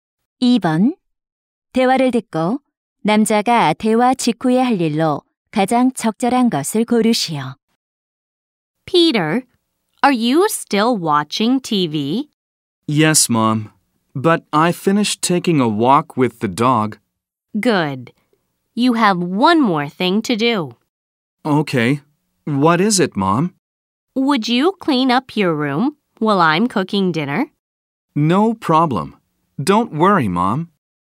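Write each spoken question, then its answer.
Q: 대화를 듣고 남자가 대화 직후에 할 일로 가장 적절한 것을 고르시오.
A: 방 청소하기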